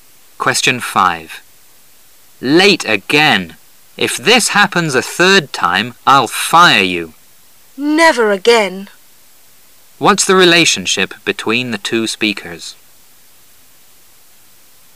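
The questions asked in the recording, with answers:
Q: What's the relationship between the two speakers?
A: Boss and employee.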